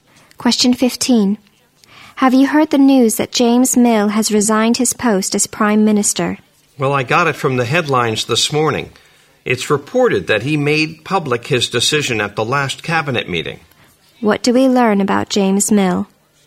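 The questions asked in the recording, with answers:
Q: What do we learn about James Mill?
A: He announced his resignation as Prime Minister at the last cabinet meeting.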